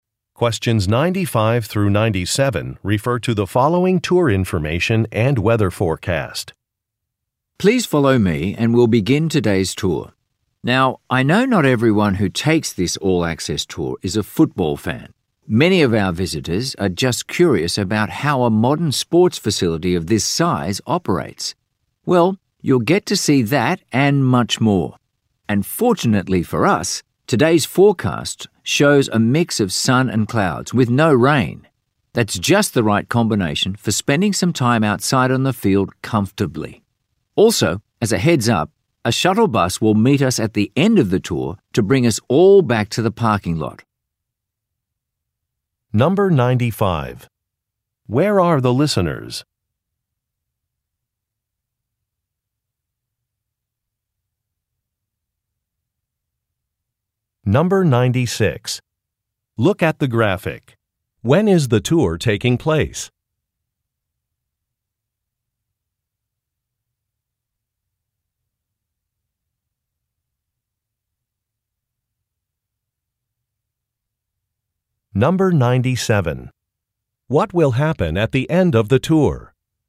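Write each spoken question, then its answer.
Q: Where are the listeners?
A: At a sports stadium (football facility)

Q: What will happen at the end of the tour?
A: A shuttle bus will take them back to the parking lot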